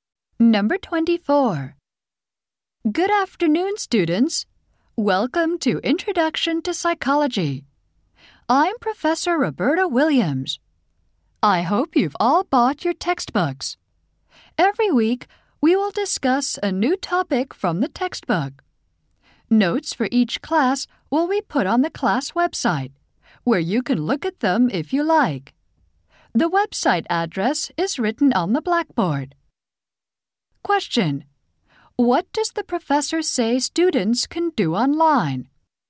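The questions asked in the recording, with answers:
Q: What does the professor say students can do online?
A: Look at the notes for each class.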